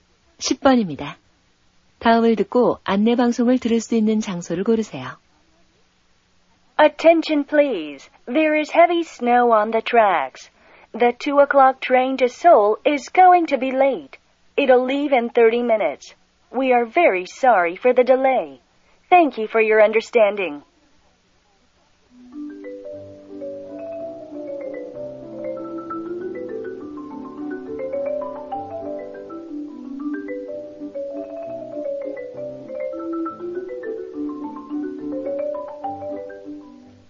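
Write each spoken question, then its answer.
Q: 다음을 듣고 안내 방송을 들을 수 있는 장소를 고르세요.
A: 기차역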